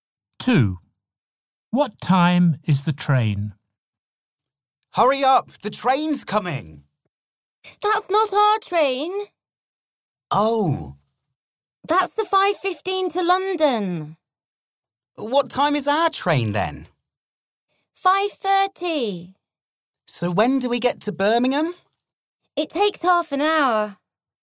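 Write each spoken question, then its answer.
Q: What time is the train?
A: 5:30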